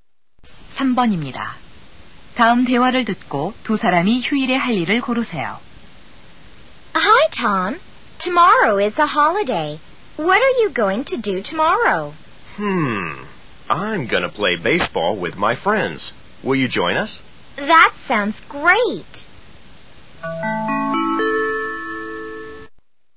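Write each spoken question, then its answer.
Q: 다음 대화를 듣고 두 사람이 휴일에 할 일을 고르세요.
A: 야구하기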